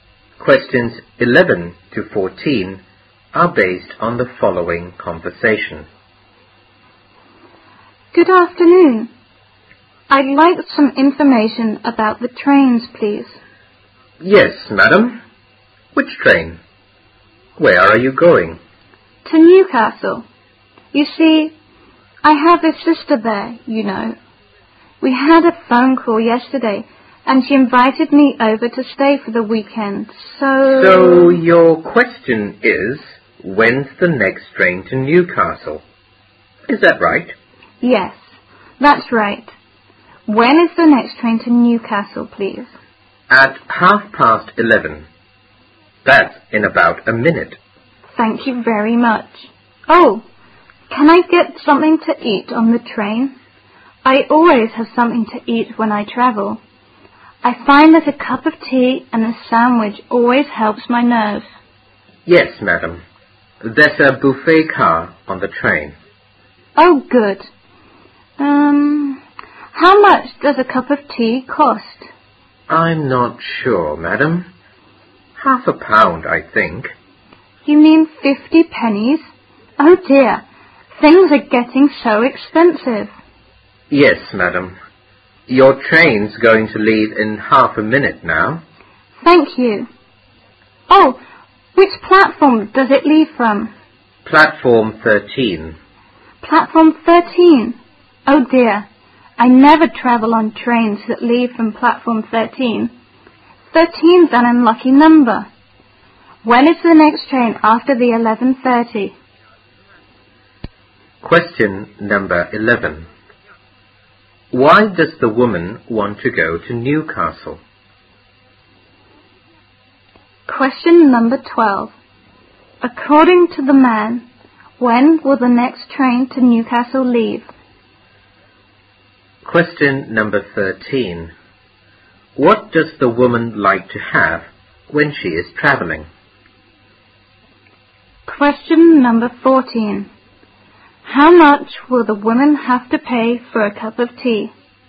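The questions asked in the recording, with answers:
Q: Why does the woman want to go to Newcastle?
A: Her sister invited her to stay for the weekend

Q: According to the man, when will the next train to Newcastle leave?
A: At 11:30

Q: What does the woman like to have when she is traveling?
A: A cup of tea and a sandwich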